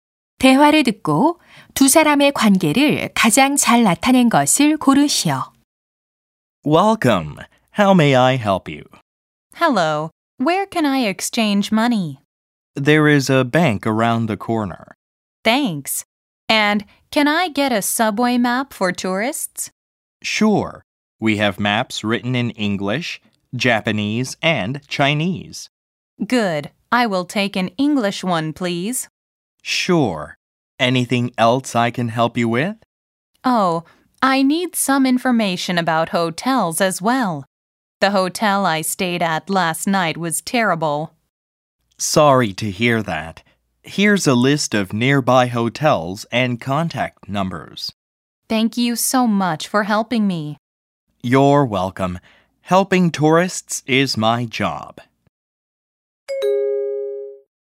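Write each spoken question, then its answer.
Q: 대화를 듣고 두 사람의 관계를 가장 잘 나타낸 것을 고르시오.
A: 관광 안내소 직원 - 관광객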